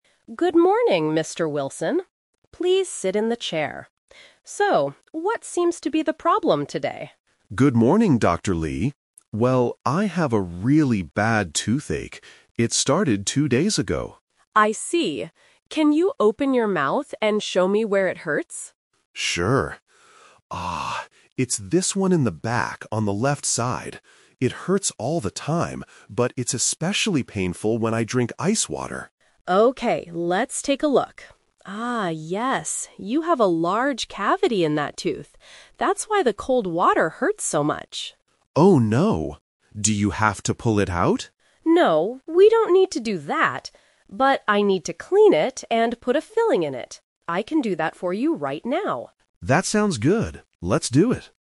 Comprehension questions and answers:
Listen to a conversation between a dentist and a patient. Choose the correct answer (A, B, or C) for each question.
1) When did the patient's toothache start?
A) Yesterday morning.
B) Two days ago.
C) Just a few hours ago.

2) When does the patient's tooth hurt the most?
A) When he eats hot soup.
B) When he drinks ice water.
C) When he brushes his teeth.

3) What is the dentist going to do today?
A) Pull the bad tooth out.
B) Clean the tooth and put a filling in it.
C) Give the patient some medicine to take home.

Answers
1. B
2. B
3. B

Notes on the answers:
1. The patient clearly says, "It started two days ago." The Trap: Options A and C are plausible timeframes for a toothache in real life, but they are not mentioned in the audio.
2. The patient points to his tooth and says, "it's especially painful when I drink ice water." The Trap: Option A and Option C are common times when a bad tooth hurts, but the patient only mentions ice water in the audio.
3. The dentist says, "I need to clean it and put a filling in it. I can do that for you right now." The Trap: Option A is the A2 "Twist" trap. The patient asks, "Do you have to pull it out?" but the dentist explicitly rejects this idea ("No, we don't need to do that"). Option C is not mentioned.

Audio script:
Dentist: Good morning, Mr. Wilson. Please sit in the chair. So, what seems to be the problem today?
Patient: Good morning, Dr. Lee. Well, I have a really bad toothache. It started two days ago.
Dentist: I see. Can you open your mouth and show me where it hurts?
Patient: Sure. (Ahhh) It's this one in the back, on the left side. It hurts all the time, but it's especially painful when I drink ice water.
Dentist: Okay, let's take a look. Ah, yes. You have a large cavity in that tooth. That's why the cold water hurts so much.
Patient: Oh no. Do you have to pull it out?
Dentist: No, we don't need to do that. But I need to clean it and put a filling in it. I can do that for you right now.

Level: A2

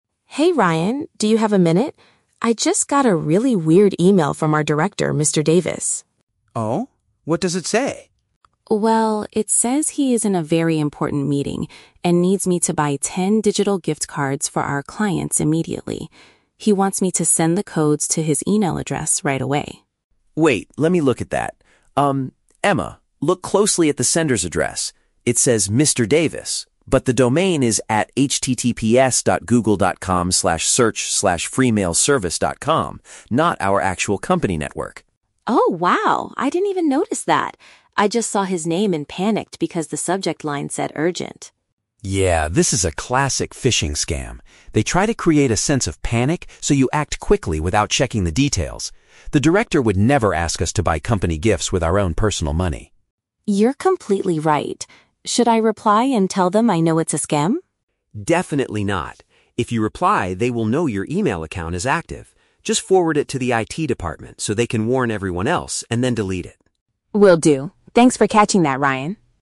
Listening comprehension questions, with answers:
Listen to the conversation between two colleagues at the office, and choose the correct answer (A, B, or C) for each question.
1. Why did Emma feel anxious about the email initially?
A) She was late for a mandatory meeting with the director.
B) The message requested immediate action from her.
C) The sender's email address looked very strange to her.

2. How does Ryan prove that the message is fake?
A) By pointing out that the sender's email domain is incorrect.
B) By checking the schedule and confirming Mr. Davis is not in a meeting.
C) By reminding her that the company never gives gifts to clients.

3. What is Ryan's final advice regarding the fake email?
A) Reply to the sender and refuse to purchase the items.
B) Report the message to the technology team and remove it.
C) Warn the director that someone is stealing his identity.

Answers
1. B
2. A
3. B

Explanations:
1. Emma says she "panicked because the subject line said 'urgent'." Option B uses the synonym phrase "requested immediate action" to mean "urgent." Why the traps are wrong: Option A is a trap; the email mentions a meeting, but Emma is not late for it. Option C is a trap because the email address is strange, but Emma admits she "didn't even notice that," so it was not the reason she was anxious.
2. Ryan tells Emma to look at the address because the domain is "@https://www.google.com/search?q=free-mail-service.com" and "not our actual company network." Option A paraphrases this. Why the traps are wrong: Option B is a plausible way to check, but Ryan never checks the director's actual schedule in the audio. Option C is a trap; Ryan mentions "gifts," but he says the director wouldn't ask them to use their "own personal money," not that they never give gifts.
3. Ryan tells Emma to "forward it to the IT department... and then delete it." Option B paraphrases this as "Report the message to the technology team and remove it." Why the traps are wrong: Option A is a trap because Emma asks if she should reply, but Ryan explicitly says, "Definitely not." Option C is a logical action, but it is not the advice Ryan gives in this conversation.

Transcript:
Emma: Hey Ryan, do you have a minute? I just got a really weird email from our director, Mr. Davis.
Ryan: Oh? What does it say?
Emma: Well, it says he is in a very important meeting and needs me to buy ten digital gift cards for our clients immediately. He wants me to send the codes to his email address right away.
Ryan: Wait, let me look at that. Emma, look closely at the sender's address. It says "Mr. Davis," but the domain is "@https://www.google.com/search?q=free-mail-service.com", not our actual company network.
Emma: Oh, wow. I didn't even notice that! I just saw his name and panicked because the subject line said "urgent".
Ryan: Yeah, this is a classic phishing scam. They try to create a sense of panic so you act quickly without checking the details. The director would never ask us to buy company gifts with our own personal money.
Emma: You're completely right. Should I reply and tell them I know it's a scam?
Ryan: Definitely not. If you reply, they will know your email account is active. Just forward it to the IT department so they can warn everyone else, and then delete it.
Emma: Will do. Thanks for catching that, Ryan!

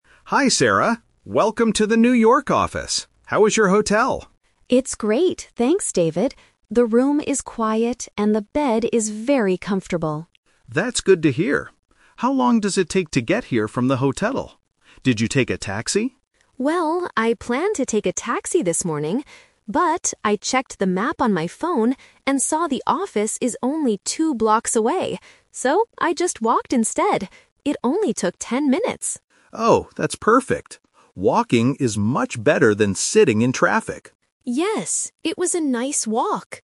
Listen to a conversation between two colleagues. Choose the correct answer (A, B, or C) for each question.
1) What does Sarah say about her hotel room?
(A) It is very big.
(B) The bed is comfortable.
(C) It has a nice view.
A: B

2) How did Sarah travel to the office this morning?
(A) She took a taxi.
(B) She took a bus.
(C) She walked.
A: C

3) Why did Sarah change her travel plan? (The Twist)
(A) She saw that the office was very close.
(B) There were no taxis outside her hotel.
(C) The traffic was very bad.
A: A

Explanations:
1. Sarah describes her hotel by saying, "The room is quiet and the bed is very comfortable." Trap: Option A and Option C are plausible things to say about a nice hotel room, but they are never mentioned in the audio.
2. This is part of the Twist. Sarah clearly says, "So, I just walked instead." Trap: Option A is what David asked ("Did you take a taxi?") and what she planned to do, but she didn't do it. Option B is a common way to travel but is not mentioned.
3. Sarah explains her decision to walk by saying, "I checked the map on my phone and saw the office is only two blocks away." ("Two blocks away" means very close). Trap: Option B is a plausible reason for not taking a taxi, but it is not her reason. Option C is a trap because David mentions "sitting in traffic" at the end, but this is his comment, not Sarah's reason for walking.

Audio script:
David: Hi Sarah. Welcome to the New York office! How is your hotel?
Sarah: It's great, thanks, David. The room is quiet and the bed is very comfortable.
David: That's good to hear. How long does it take to get here from the hotel? Did you take a taxi?
Sarah: Well, I planned to take a taxi this morning. But, I checked the map on my phone and saw the office is only two blocks away. So, I just walked instead. It only took ten minutes!
David: Oh, that's perfect. Walking is much better than sitting in traffic.
Sarah: Yes, it was a nice walk!

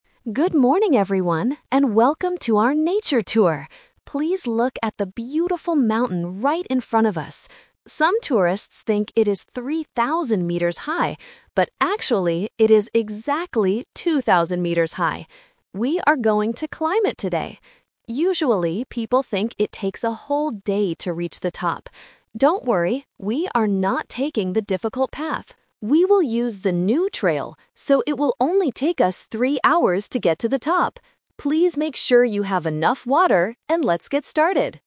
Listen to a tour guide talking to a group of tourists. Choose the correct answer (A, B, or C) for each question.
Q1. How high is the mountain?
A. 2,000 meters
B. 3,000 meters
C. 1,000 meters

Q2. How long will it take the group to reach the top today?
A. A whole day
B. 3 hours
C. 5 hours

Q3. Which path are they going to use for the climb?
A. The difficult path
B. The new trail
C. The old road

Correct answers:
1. A
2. B
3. B

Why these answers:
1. Why A is correct: The tour guide clearly states: "actually, it is exactly 2,000 meters high." Why B is a trap: The guide says that "Some tourists think it is 3,000 meters high", but this is just what people guess, not the real height. Why C is wrong: 1,000 meters is never mentioned in the audio.
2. Why B is correct: The guide confirms the time by saying, "it will only take us 3 hours to get to the top." Why A is a trap: "A whole day" is what people usually think it takes, but it is not the actual time for this group. Why C is wrong: 5 hours is not mentioned at all.
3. Why B is correct: The guide tells the group: "We will use the new trail..." Why A is a trap: The "difficult path" is mentioned in the audio, but the guide explicitly rejects it ("We are not taking the difficult path"). Why C is wrong: An old road is a plausible path for a mountain, but it is not spoken about in the script.

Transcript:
Tour Guide: Good morning, everyone, and welcome to our nature tour! Please look at the beautiful mountain right in front of us. Some tourists think it is 3,000 meters high, but actually, it is exactly 2,000 meters high. We are going to climb it today. Usually, people think it takes a whole day to reach the top. Don't worry! We are not taking the difficult path. We will use the new trail, so it will only take us 3 hours to get to the top. Please make sure you have enough water, and let's get started!

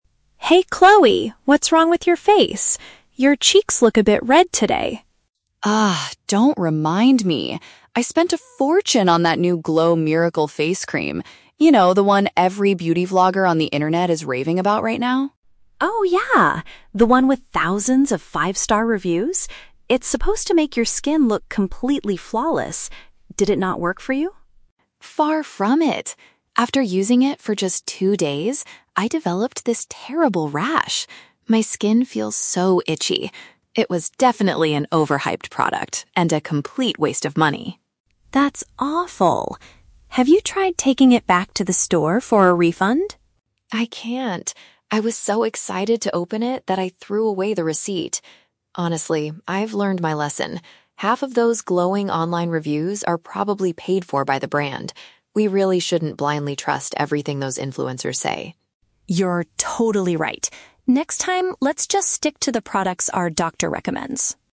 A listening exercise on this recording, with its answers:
Listen to two friends talking about a cosmetic product in a cafe. Choose the correct answer (A, B, or C).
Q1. What happened to Chloe after she used the new face cream?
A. Her skin became perfectly flawless.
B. She got an uncomfortable red rash.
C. She had to go to the local hospital.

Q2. Why is Chloe unable to get her money back?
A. Because she did not keep the proof of purchase.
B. Because she used the cream for more than two days.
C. Because the store does not accept open cosmetic bottles.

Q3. What does Chloe currently believe about the beauty vloggers?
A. They give very honest and helpful advice.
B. They are secretly receiving money from the company.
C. They want to become famous doctors in the future.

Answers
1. B
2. A
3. B

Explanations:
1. Chloe complains that her cheeks are "red" and that she developed a "terrible rash" that feels "so itchy" (uncomfortable). The Trap: Option (A) is a trap. Mia says the cream is supposed to make skin look "completely flawless," but Chloe says her experience was "far from it." Option (C) is a plausible consequence of an allergy but is never mentioned in the audio.
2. Chloe says she cannot get a refund because she "threw away the receipt." "Proof of purchase" is a B1-level paraphrase for a receipt. The Trap: Option (B) is a trap. Chloe mentions the time period "two days", but she says she used it for just two days, not more than two days, and that was not the reason she couldn't get a refund. Option (C) is a logical real-world store policy but is not mentioned in the dialogue.
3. Chloe states that the reviews are "probably paid for by the brand" and warns Mia not to "blindly trust everything those influencers say." The Trap: Option (A) is the exact opposite of what Chloe believes (The Trap of Contradiction). Option (C) is a trap because the word "doctor" is mentioned by Mia at the end, but the vloggers are not trying to be doctors.

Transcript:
Mia: Hey Chloe, what's wrong with your face? Your cheeks look a bit red today.
Chloe: Ugh, don't remind me. I spent a fortune on that new Glow Miracle face cream. You know, the one every beauty vlogger on the internet is raving about right now?
Mia: Oh yeah! The one with thousands of five-star reviews. It's supposed to make your skin look completely flawless. Did it not work for you?
Chloe: Far from it! After using it for just two days, I developed this terrible rash. My skin feels so itchy. It was definitely an overhyped product and a complete waste of money.
Mia: That's awful. Have you tried taking it back to the store for a refund?
Chloe: I can't. I was so excited to open it that I threw away the receipt. Honestly, I've learned my lesson. Half of those glowing online reviews are probably paid for by the brand. We really shouldn't blindly trust everything those influencers say.
Mia: You're totally right. Next time, let's just stick to the products our doctor recommends.

